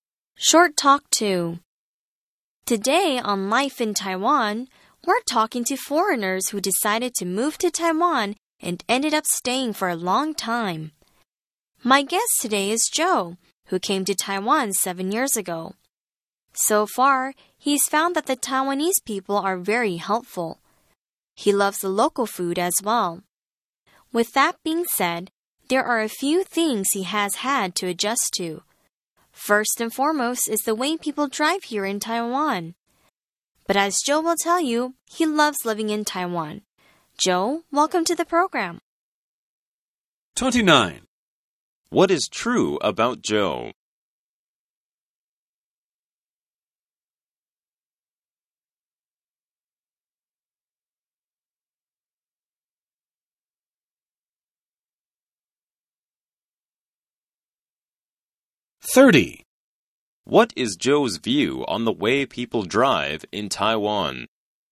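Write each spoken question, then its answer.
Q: What is Joe's view on the way people drive in Taiwan?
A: It is something he has had to adjust to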